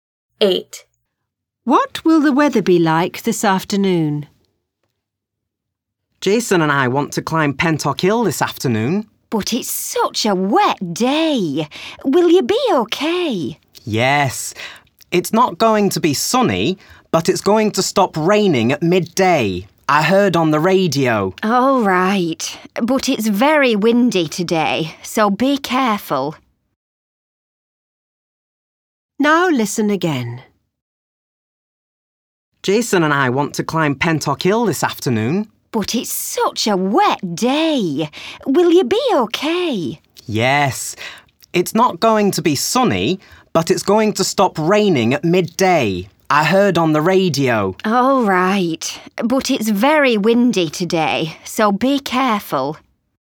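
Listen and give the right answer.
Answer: Dry but cloudy and windy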